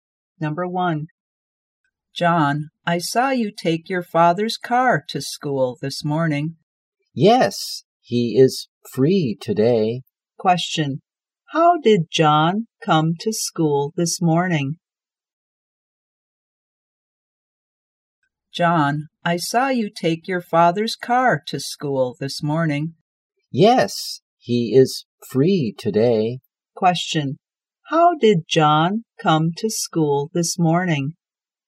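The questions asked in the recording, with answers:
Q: How did John come to school this morning?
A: By his father's car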